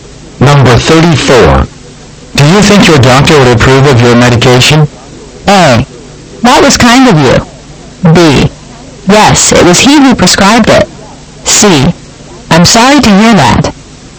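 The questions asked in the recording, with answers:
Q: Do you think your doctor would approve of your medication?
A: B: Yes, it was he who prescribed it.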